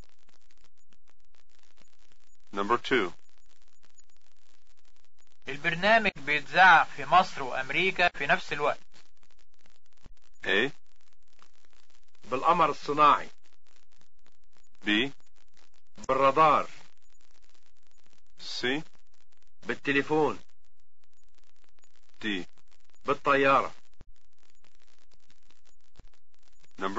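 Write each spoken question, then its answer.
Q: البرنامج بيتذاع في مصر وأمريكا في نفس الوقت.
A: A: بالقمر الصناعي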